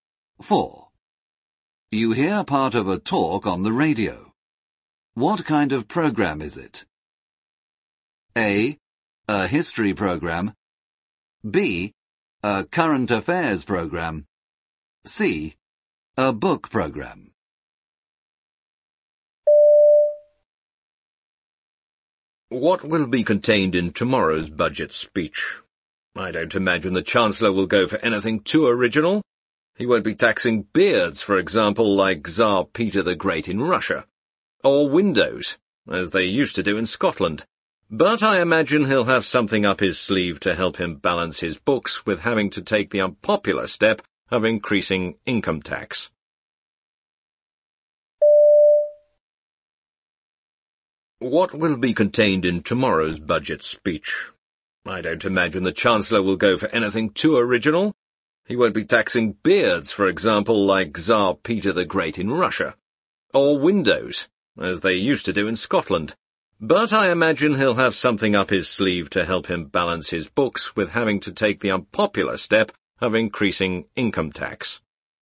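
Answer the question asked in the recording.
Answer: B: A current affairs program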